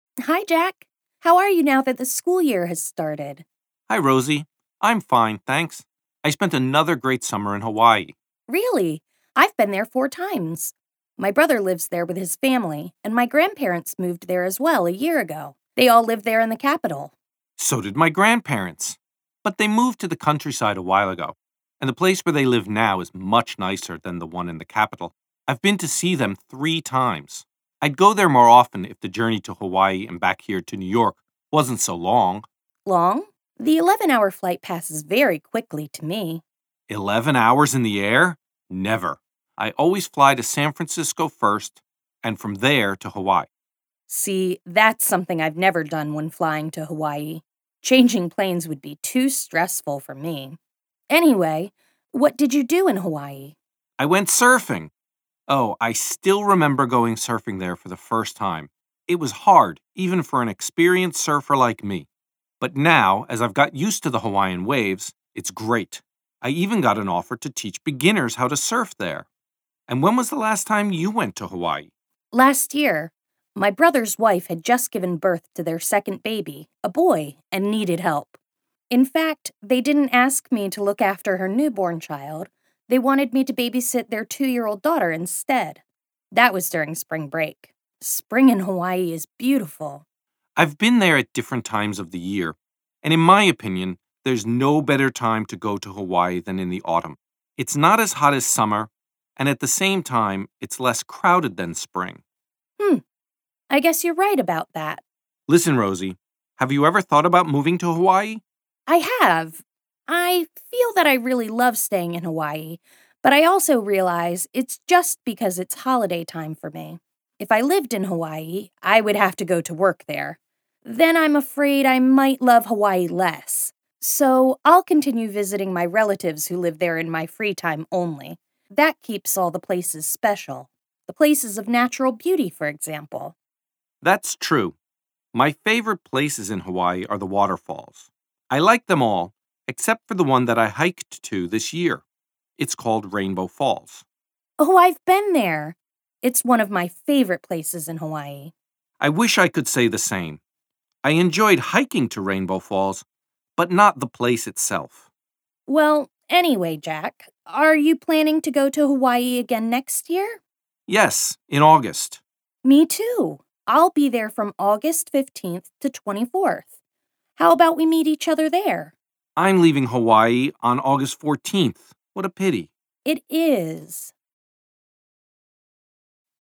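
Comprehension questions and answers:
Uslyšíte rozhovor o Havaji mezi spolužáky ze školy v New Yorku. Na základě vyslechnuté nahrávky rozhodněte, zda jsou tvrzení v úlohách 5–12 pravdivá (P), nebo nepravdivá (N).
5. Jack's grandparents live in the capital of Hawaii.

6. Rosie always takes a non-stop flight from New York to Hawaii.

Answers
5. N
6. P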